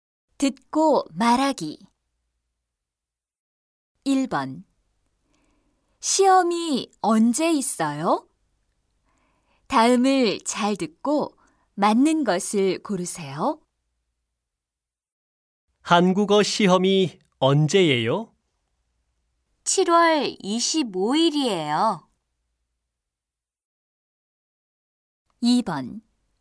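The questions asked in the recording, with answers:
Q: 시험이 언제 있어요?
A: 7월 25일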